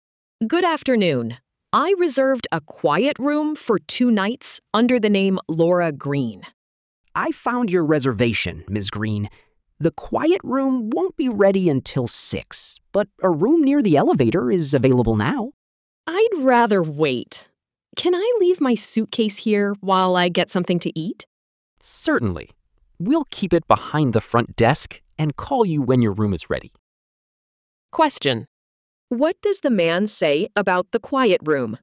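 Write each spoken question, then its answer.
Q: What does the man say about the quiet room?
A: It won't be ready until 6.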